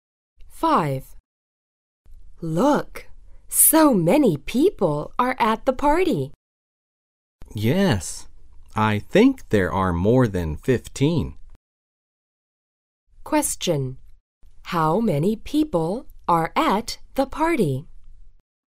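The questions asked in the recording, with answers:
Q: How many people are at the party?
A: More than 15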